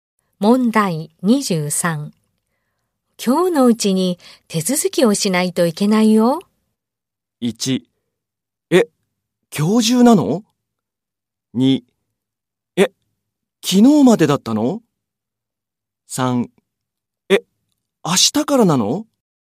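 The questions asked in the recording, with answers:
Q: 今日のうちに手続きをしないといけないよ。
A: 1: え、今日中なの?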